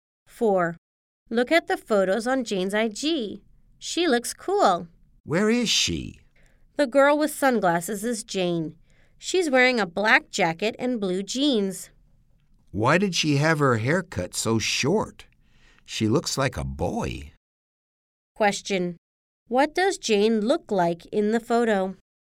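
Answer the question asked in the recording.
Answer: She has short hair and is wearing sunglasses, a black jacket and blue jeans.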